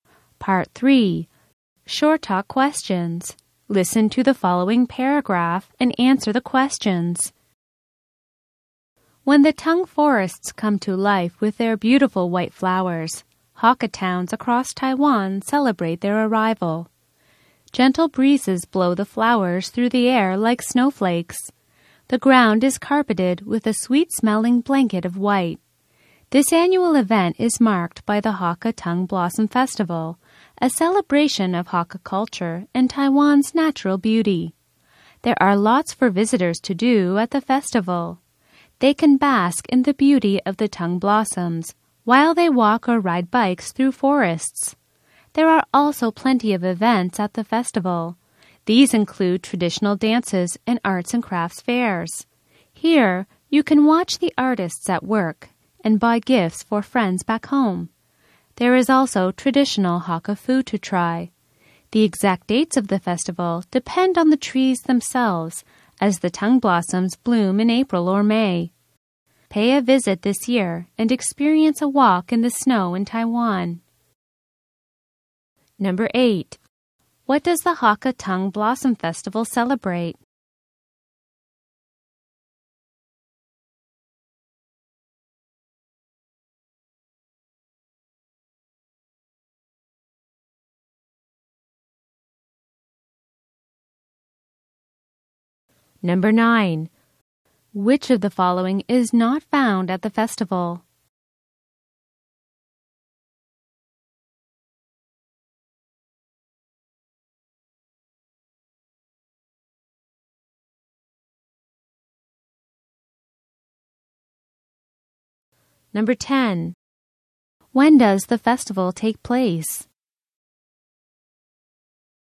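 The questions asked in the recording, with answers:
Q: What does the Hakka Tongue Blossom Festival celebrate?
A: Hakka culture and Taiwan's natural beauty (the Tung blossoms)

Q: When does the festival take place?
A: In April or May, when the Tung blossoms bloom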